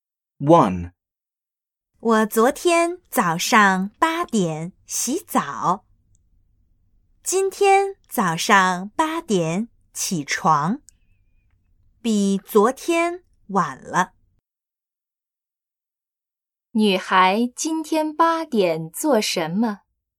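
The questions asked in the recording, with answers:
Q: 女孩今天八点做什么?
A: 起床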